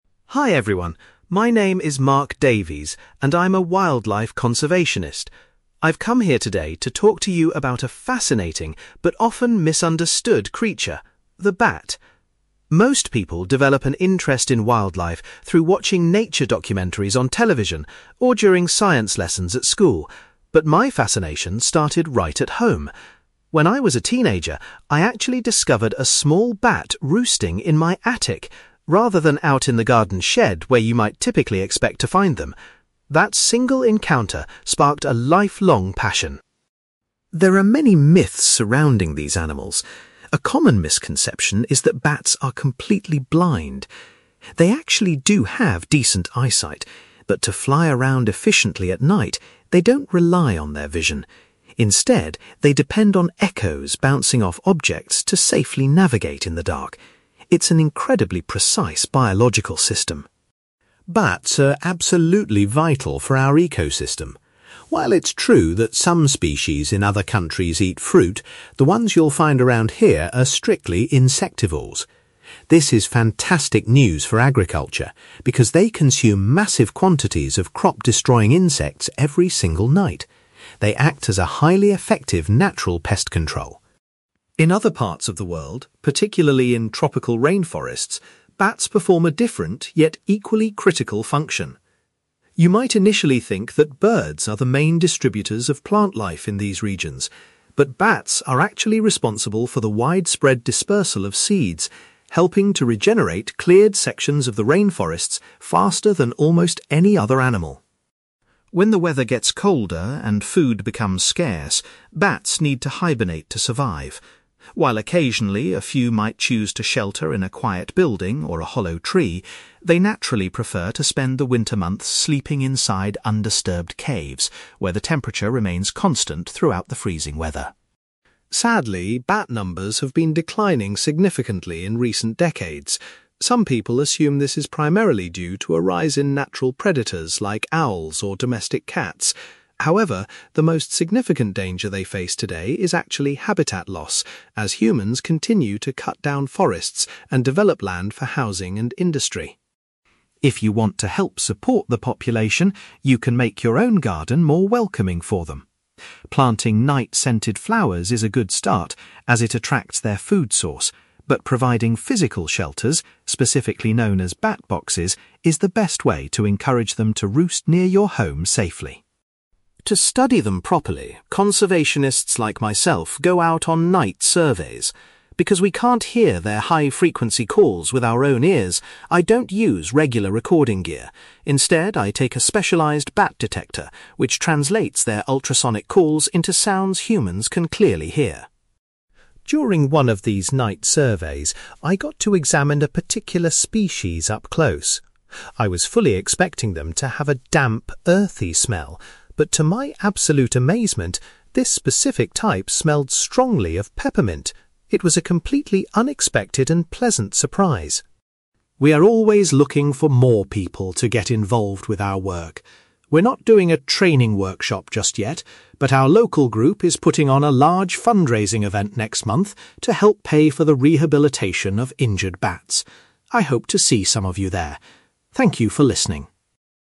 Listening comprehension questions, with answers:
You will hear a wildlife conservationist called Mark giving a talk about bats. For questions 9-18, complete the sentences with a word or short phrase.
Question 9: Mark first became interested in bats after finding one in his (9)........................... as a teenager.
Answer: attic

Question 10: Mark explains that bats use a system based on (10)........................... to navigate in the dark.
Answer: echoes

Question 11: Mark highlights that farmers benefit greatly because bats eat huge numbers of (11)........................... .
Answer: insects

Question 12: In tropical regions, bats play a crucial role in the spreading of (12)........................... .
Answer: seeds

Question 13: During winter, Mark says bats usually sleep in places like (13)........................... rather than buildings.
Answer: caves

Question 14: Mark identifies (14)........................... as the biggest current threat to bat populations.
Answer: habitat loss

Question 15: Mark recommends putting up special (15)........................... to encourage bats to live in gardens.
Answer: bat boxes

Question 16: Mark uses a piece of equipment called a (16)........................... to listen to bats.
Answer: bat detector

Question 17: Mark was surprised to learn that one local bat species smelled like (17)........................... .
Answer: peppermint

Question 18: Mark says the local conservation group is organising a (18)........................... next month.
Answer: fundraising event

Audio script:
Mark Davies: Hi everyone, my name is Mark Davies, and I'm a wildlife conservationist. I've come here today to talk to you about a fascinating, but often misunderstood creature: the bat. Most people develop an interest in wildlife through watching nature documentaries on television or during science lessons at school, but my fascination started right at home. When I was a teenager, I actually discovered a small bat roosting in my attic, rather than out in the garden shed where you might typically expect to find them. That single encounter sparked a lifelong passion.
There are many myths surrounding these animals. A common misconception is that bats are completely blind. They actually do have decent eyesight, but to fly around efficiently at night, they don't rely on their vision. Instead, they depend on echoes bouncing off objects to safely navigate in the dark. It's an incredibly precise biological system.
Bats are absolutely vital for our ecosystem. While it's true that some species in other countries eat fruit, the ones you'll find around here are strictly insectivores. This is fantastic news for agriculture, because they consume massive quantities of crop-destroying insects every single night. They act as a highly effective, natural pest control.
In other parts of the world, particularly in tropical rainforests, bats perform a different, yet equally critical function. You might initially think that birds are the main distributors of plant life in these regions, but bats are actually responsible for the widespread dispersal of seeds, helping to regenerate cleared sections of the rainforests faster than almost any other animal.
When the weather gets colder and food becomes scarce, bats need to hibernate to survive. While occasionally a few might choose to shelter in a quiet building or a hollow tree, they naturally prefer to spend the winter months sleeping inside undisturbed caves where the temperature remains constant throughout the freezing weather.
Sadly, bat numbers have been declining significantly in recent decades. Some people assume this is primarily due to a rise in natural predators like owls or domestic cats. However, the most significant danger they face today is actually habitat loss, as humans continue to cut down forests and develop land for housing and industry.
If you want to help support the population, you can make your own garden more welcoming for them. Planting night-scented flowers is a good start as it attracts their food source, but providing physical shelters, specifically known as bat boxes, is the best way to encourage them to roost near your home safely.
To study them properly, conservationists like myself go out on night surveys. Because we can't hear their high-frequency calls with our own ears, I don't use regular recording gear; instead, I take a specialized bat detector which translates their ultrasonic calls into sounds humans can clearly hear.
During one of these night surveys, I got to examine a particular species up close. I was fully expecting them to have a damp, earthy smell, but to my absolute amazement, this specific type smelled strongly of peppermint! It was a completely unexpected and pleasant surprise.
We are always looking for more people to get involved with our work. We're not doing a training workshop just yet, but our local group is putting on a large fundraising event next month to help pay for the rehabilitation of injured bats. I hope to see some of you there. Thank you for listening.

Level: B2